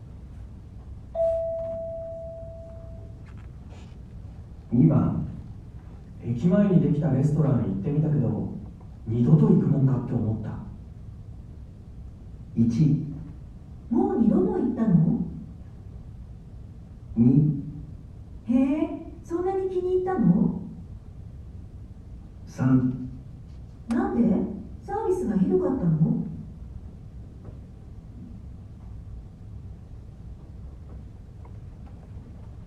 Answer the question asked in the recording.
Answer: 3

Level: N1 Listening · Test 2